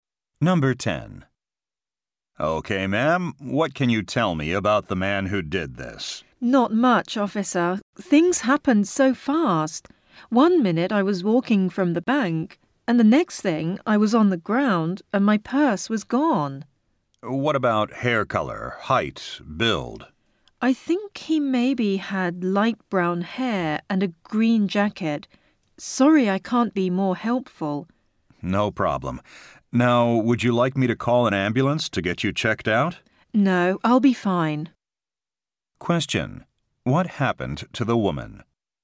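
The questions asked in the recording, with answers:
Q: What happened to the woman?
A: Her purse was stolen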